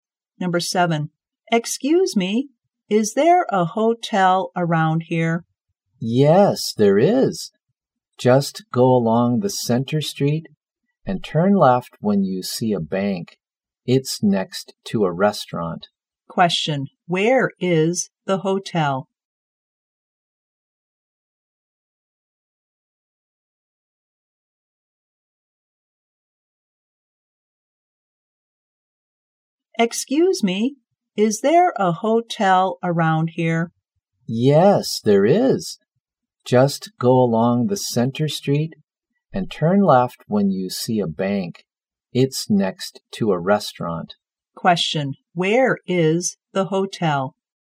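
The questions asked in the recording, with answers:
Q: where is the hotel?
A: Next to a restaurant.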